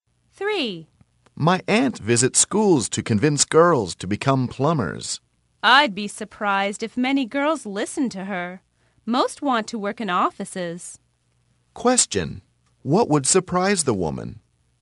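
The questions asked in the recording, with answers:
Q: What would surprise the woman?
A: If many girls listened to the aunt and became plumbers.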